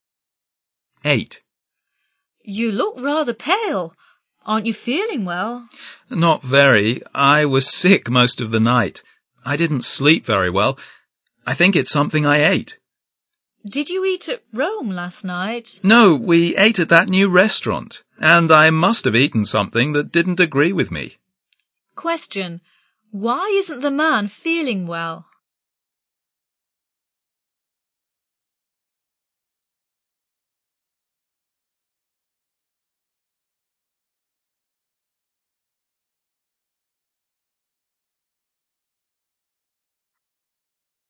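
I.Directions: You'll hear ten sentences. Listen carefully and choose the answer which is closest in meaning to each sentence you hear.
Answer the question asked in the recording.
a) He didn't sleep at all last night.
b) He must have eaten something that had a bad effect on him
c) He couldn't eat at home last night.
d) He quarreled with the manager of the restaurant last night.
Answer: b) He must have eaten something that had a bad effect on him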